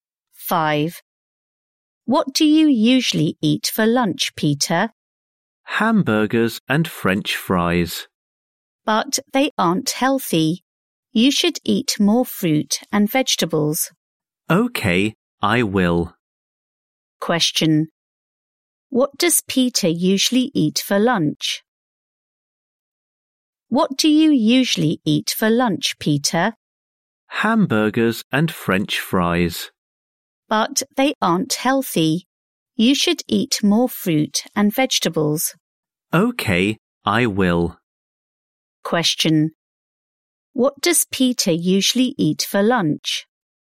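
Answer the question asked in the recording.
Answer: Hamburgers and French fries.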